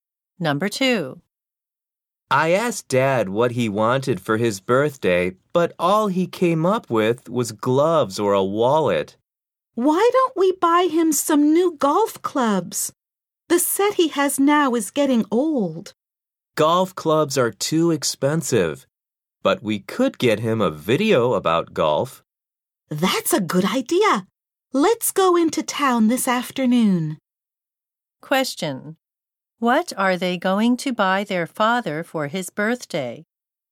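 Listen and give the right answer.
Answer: A video about golf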